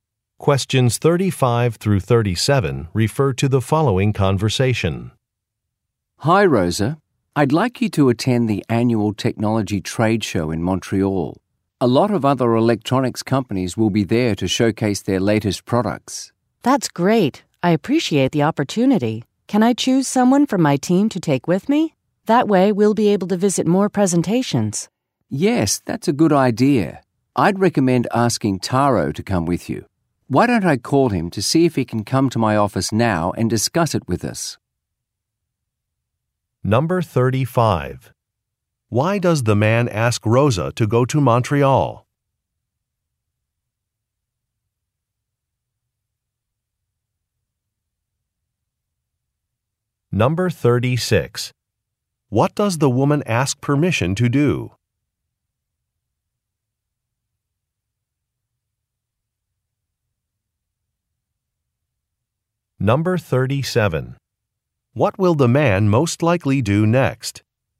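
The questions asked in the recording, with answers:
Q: Why does the man ask Rosa to go to Montreal?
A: To attend a technology trade show

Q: What does the woman ask permission to do?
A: Bring a team member with her

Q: What will the man most likely do next?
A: Call Taro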